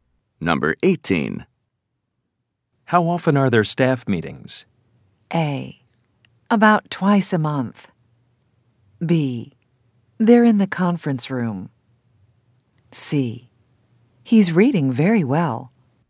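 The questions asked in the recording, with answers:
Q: How often are there staff meetings?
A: A: About twice a month.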